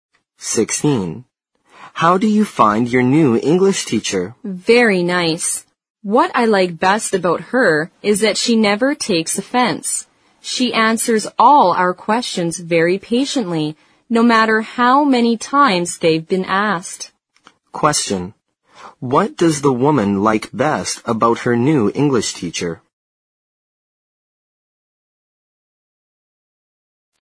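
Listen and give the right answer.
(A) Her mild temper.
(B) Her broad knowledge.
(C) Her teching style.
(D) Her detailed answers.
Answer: (A) Her mild temper.

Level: 四级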